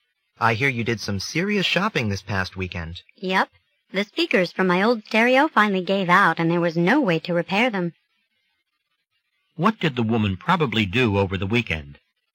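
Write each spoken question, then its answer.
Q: What did the woman probably do over the weekend?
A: She bought new stereo speakers.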